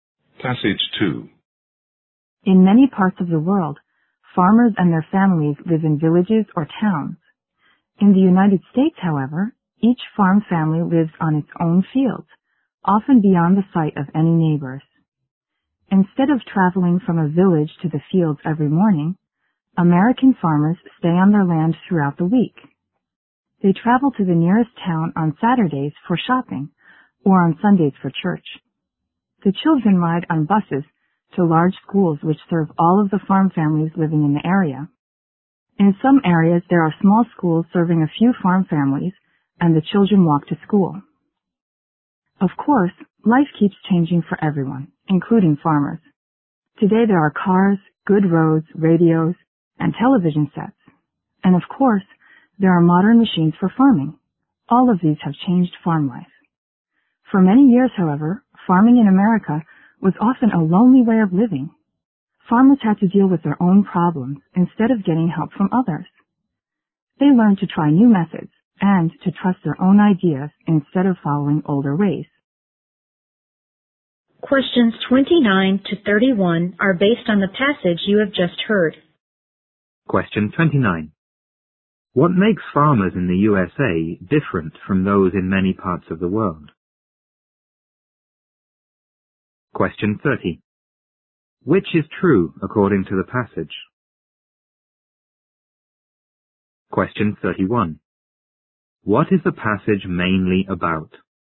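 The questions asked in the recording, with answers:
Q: What makes farmers in the USA different from those in many parts of the world?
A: Each farm family lives on its own fields, not in villages

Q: What is the passage mainly about?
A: Farm life in America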